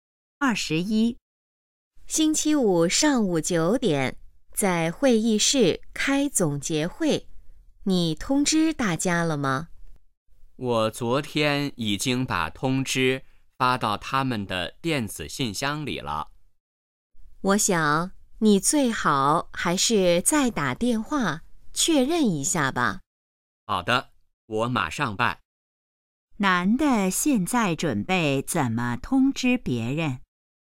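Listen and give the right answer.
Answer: 打电话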